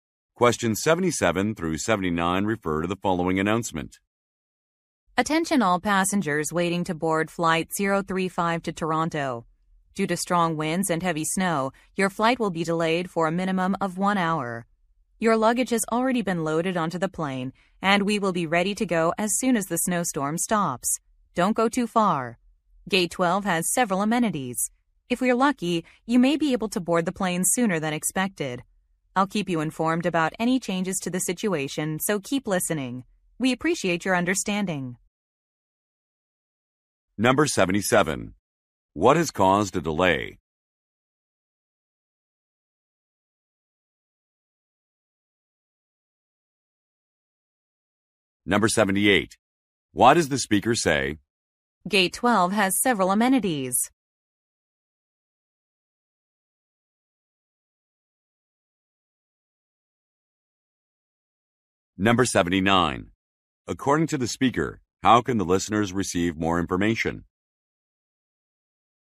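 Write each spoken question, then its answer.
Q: What has caused a delay?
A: Bad weather (strong winds and heavy snow)

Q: According to the speaker, how can the listeners receive more information?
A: By listening for announcements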